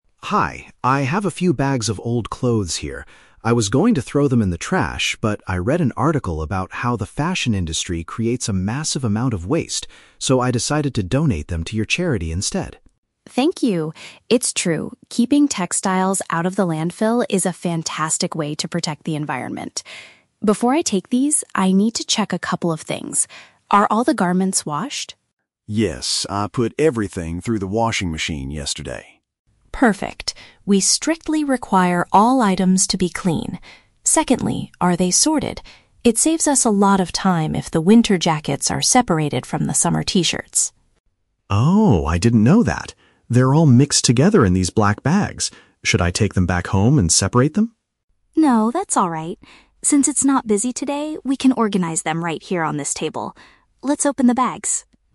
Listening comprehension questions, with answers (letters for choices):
Listen to a conversation between a citizen and a charity volunteer. Choose the correct answer (A, B, or C) for each question.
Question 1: Why did the man bring his old clothes to the charity?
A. He wants to prevent them from ending up in a dump.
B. He needs to make space in his closet for new outfits.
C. He read a flyer about the charity's clothing drive.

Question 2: What is a strict requirement for the donated clothes, according to the volunteer?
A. They must be delivered in black plastic bags.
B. They must be freshly cleaned before arrival.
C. They must be organized by the time of year they are worn.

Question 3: What will the two speakers do next?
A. Take the bags back to Tom's house to sort them.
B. Put the dirty garments into a washing machine.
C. Divide the mixed clothing into different categories.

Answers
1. A
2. B
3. C

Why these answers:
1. Tom says he was going to throw them away but decided to donate them, and Mia agrees that "keeping textiles out of the landfill" is a great way to protect the environment. (Paraphrasing: prevent them from ending up in a dump = keeping textiles out of the landfill). Why the trap is wrong: Option (C) is a trap. Tom says he "read an article," not a flyer about the charity. Option (B) is a plausible reason for giving away clothes, but it is not mentioned in the audio.
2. Mia asks if the garments are washed and says, "We strictly require all items to be clean." (Paraphrasing: freshly cleaned = washed / clean). Why the trap is wrong: Option (C) is the trap. Organizing them by season (winter jackets vs. summer t-shirts) is mentioned, but Mia says it "saves us a lot of time" rather than being a strict requirement that would make her reject the clothes. Option (A) is a trap because Tom used "black bags," but it is not a rule.
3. Mia says, "we can organize them right here on this table. Let's open the bags." (Paraphrasing: Divide into different categories = organize them / separate them). Why the trap is wrong: Option (A) is a very strong trap. Tom asks, "Should I take them back home and separate them?" but Mia explicitly says "No" and offers to do it at the charity center. Option (B) is a trap because the clothes ha

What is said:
Tom: Hi, I have a few bags of old clothes here. I was going to throw them in the trash, but I read an article about how the fashion industry creates a massive amount of waste. So, I decided to donate them to your charity instead.
Mia: Thank you! It's true, keeping textiles out of the landfill is a fantastic way to protect the environment. Before I take these, I need to check a couple of things. Are all the garments washed?
Tom: Yes, I put everything through the washing machine yesterday.
Mia: Perfect. We strictly require all items to be clean. Secondly, are they sorted? It saves us a lot of time if the winter jackets are separated from the summer t-shirts.
Tom: Oh, I didn't know that. They are all mixed together in these black bags. Should I take them back home and separate them?
Mia: No, that's alright. Since it's not busy today, we can organize them right here on this table. Let's open the bags.